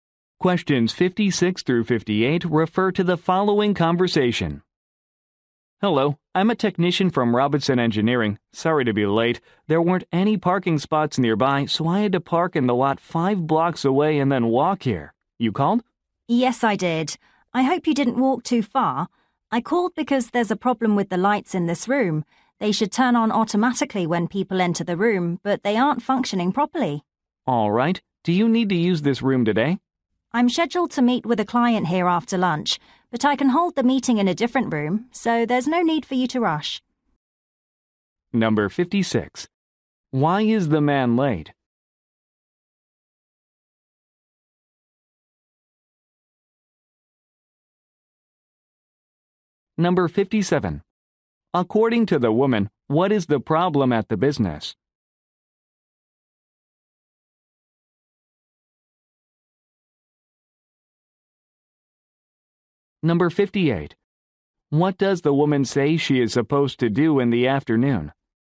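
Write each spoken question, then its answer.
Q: Why is the man late?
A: He had to park five blocks away and walk

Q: According to the woman, what is the problem at the business?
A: The automatic lights don't work properly

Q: What does the woman say she is supposed to do in the afternoon?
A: Meet with a client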